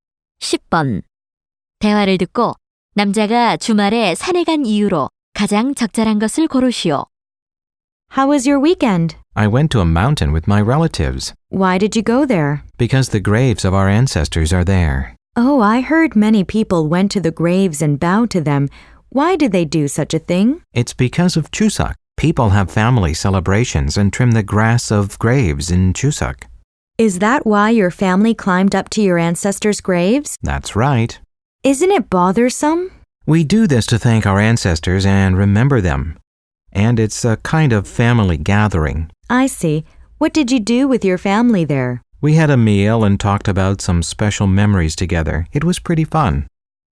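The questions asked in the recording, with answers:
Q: 대화를 듣고 남자가 주말에 산에 간 이유로 가장 적절한 것을 고르시오.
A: 추석을 맞아 조상의 묘를 찾아 벌초하려고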